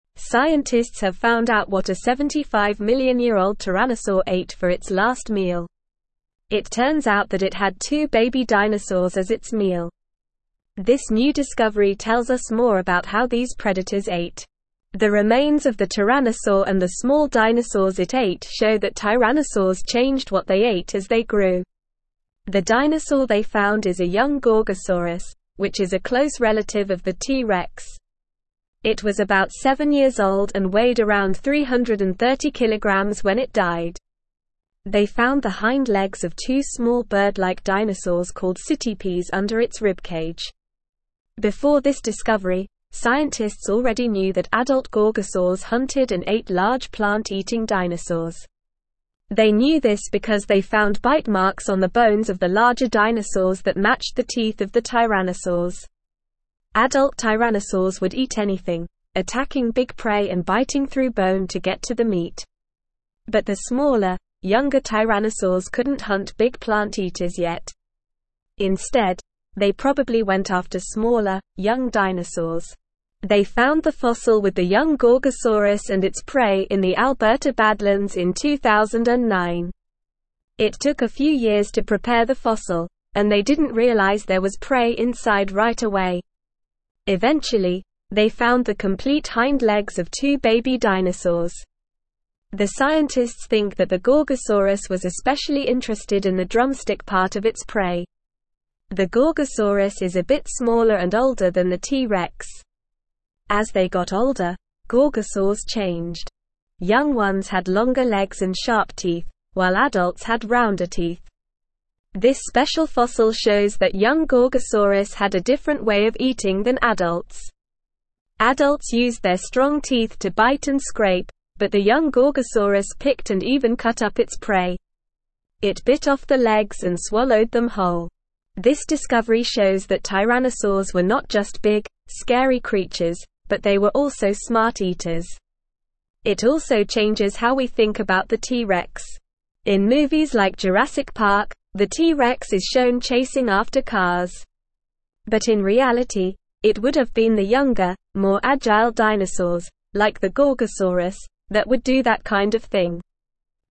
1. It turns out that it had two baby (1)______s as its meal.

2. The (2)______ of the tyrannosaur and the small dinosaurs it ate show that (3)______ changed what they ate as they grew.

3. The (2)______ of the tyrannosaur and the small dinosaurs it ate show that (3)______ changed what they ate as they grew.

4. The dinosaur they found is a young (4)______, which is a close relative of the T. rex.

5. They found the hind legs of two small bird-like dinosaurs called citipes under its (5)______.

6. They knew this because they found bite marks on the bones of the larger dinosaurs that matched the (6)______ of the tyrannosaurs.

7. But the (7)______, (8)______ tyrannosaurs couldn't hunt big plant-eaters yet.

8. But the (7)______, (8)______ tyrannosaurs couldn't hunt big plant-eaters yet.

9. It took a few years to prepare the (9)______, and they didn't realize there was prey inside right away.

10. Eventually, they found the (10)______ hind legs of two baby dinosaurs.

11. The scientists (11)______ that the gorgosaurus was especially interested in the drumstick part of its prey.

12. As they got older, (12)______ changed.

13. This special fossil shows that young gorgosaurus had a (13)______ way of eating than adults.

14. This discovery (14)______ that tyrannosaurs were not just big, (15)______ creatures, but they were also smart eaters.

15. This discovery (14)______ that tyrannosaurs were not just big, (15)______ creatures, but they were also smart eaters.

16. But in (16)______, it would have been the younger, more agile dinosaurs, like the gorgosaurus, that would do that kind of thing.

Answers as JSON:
{"1": "dinosaur", "2": "remains", "3": "tyrannosaurs", "4": "gorgosaurus", "5": "ribcage", "6": "teeth", "7": "smaller", "8": "younger", "9": "fossil", "10": "complete", "11": "think", "12": "gorgosaurs", "13": "different", "14": "shows", "15": "scary", "16": "reality"}

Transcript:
Scientists have found out what a 75-million-year-old tyrannosaur ate for its last meal. It turns out that it had two baby dinosaurs as its meal. This new discovery tells us more about how these predators ate. The remains of the tyrannosaur and the small dinosaurs it ate show that tyrannosaurs changed what they ate as they grew. The dinosaur they found is a young gorgosaurus, which is a close relative of the T. rex. It was about seven years old and weighed around 330kg when it died. They found the hind legs of two small bird-like dinosaurs called citipes under its ribcage.
Before this discovery, scientists already knew that adult gorgosaurs hunted and ate large plant-eating dinosaurs. They knew this because they found bite marks on the bones of the larger dinosaurs that matched the teeth of the tyrannosaurs. Adult tyrannosaurs would eat anything, attacking big prey and biting through bone to get to the meat. But the smaller, younger tyrannosaurs couldn't hunt big plant-eaters yet. Instead, they probably went after smaller, young dinosaurs.
They found the fossil with the young gorgosaurus and its prey in the Alberta Badlands in 2009. It took a few years to prepare the fossil, and they didn't realize there was prey inside right away. Eventually, they found the complete hind legs of two baby dinosaurs. The scientists think that the gorgosaurus was especially interested in the drumstick part of its prey.
The gorgosaurus is a bit smaller and older than the T. rex. As they got older, gorgosaurs changed. Young ones had longer legs and sharp teeth, while adults had rounder teeth. This special fossil shows that young gorgosaurus had a different way of eating than adults. Adults used their strong teeth to bite and scrape, but the young gorgosaurus picked and even cut up its prey. It bit off the legs and swallowed them whole.
This discovery shows that tyrannosaurs were not just big, scary creatures, but they were also smart eaters. It also changes how we think about the T. rex. In movies like Jurassic Park, the T. rex is shown chasing after cars. But in reality, it would have been the younger, more agile dinosaurs, like the gorgosaurus, that would do that kind of thing.

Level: Level 3